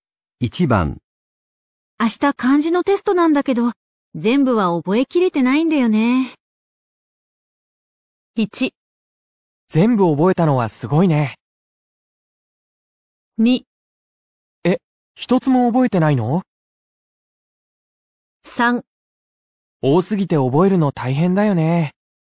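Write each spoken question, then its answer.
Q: 明日漢字のテストなんだけど、全部は覚えきれてないんだよね。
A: 3: 多すぎて覚えるの大変だよね。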